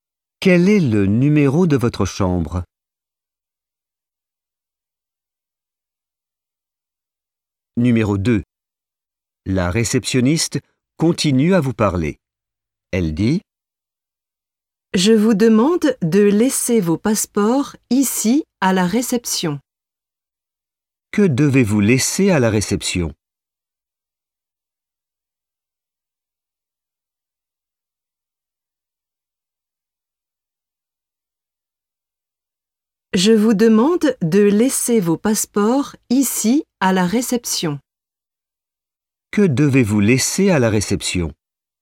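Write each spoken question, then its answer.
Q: Que devez-vous laisser à la réception ?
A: vos passeports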